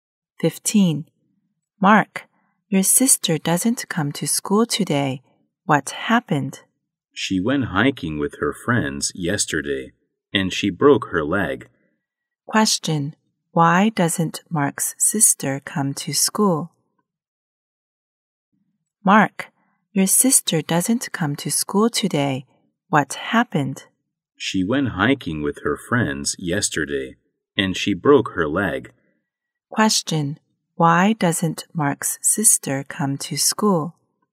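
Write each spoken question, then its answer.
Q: why doesn't Mark's sister come to school?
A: She broke her leg while hiking.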